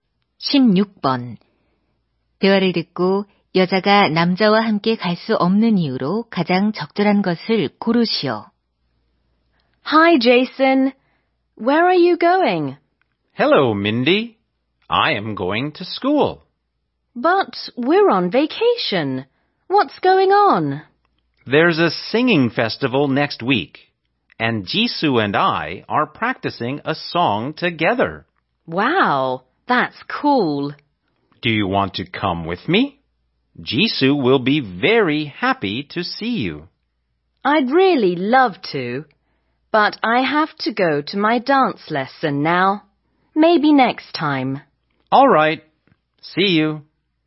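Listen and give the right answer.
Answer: 춤 수업에 가야 해서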